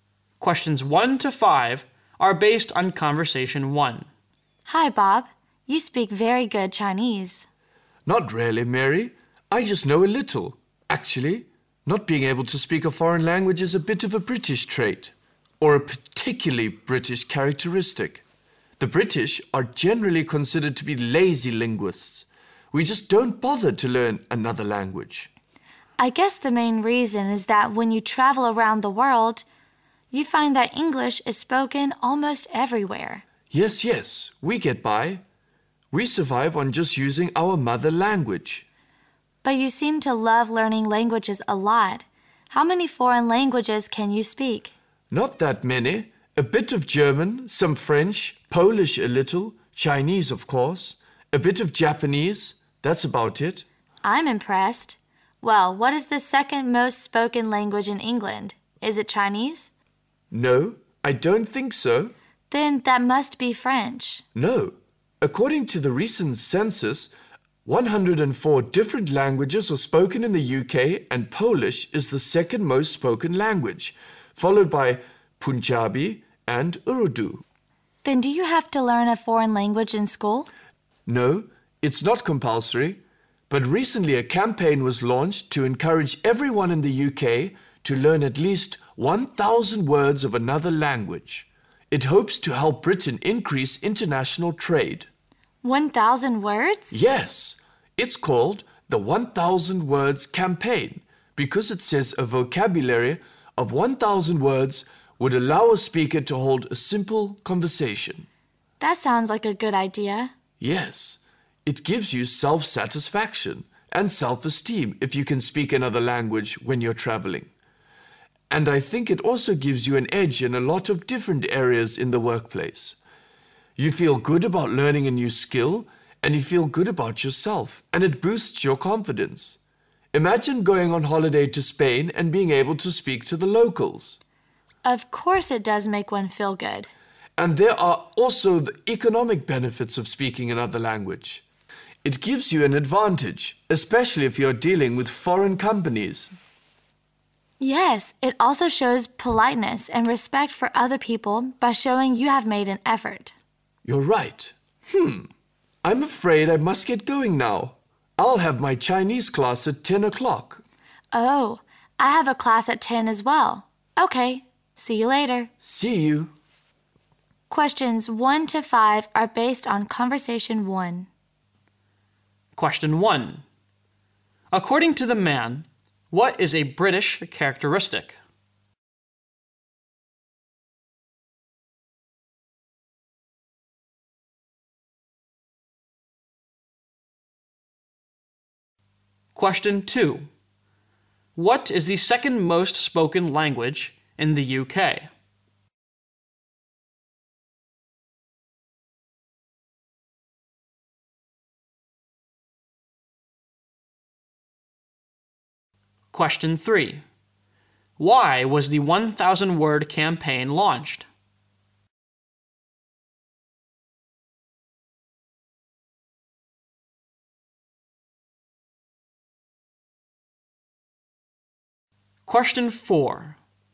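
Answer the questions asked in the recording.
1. Not being able to speak a foreign language; the British are lazy linguists
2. Polish
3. To help Britain increase international trade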